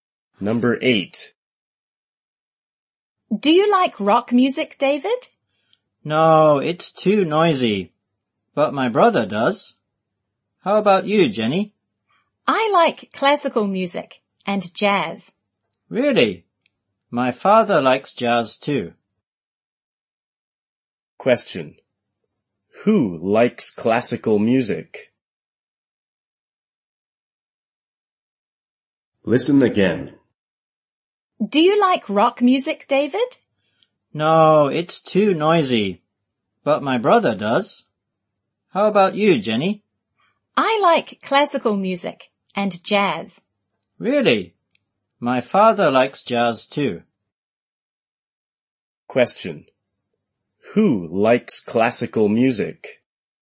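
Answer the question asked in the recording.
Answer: Jenny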